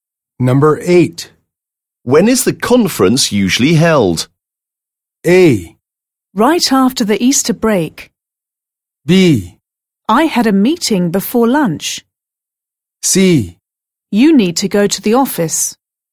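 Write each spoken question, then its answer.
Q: When is the conference usually held?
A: A: Right after the Easter break.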